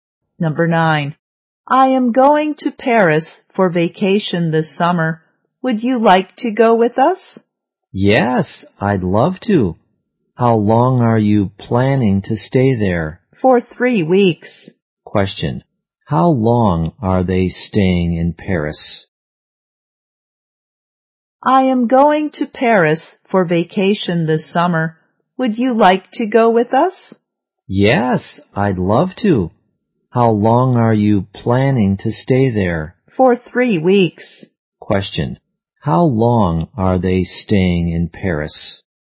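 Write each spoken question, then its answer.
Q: How long are they staying in Paris?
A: For 3 weeks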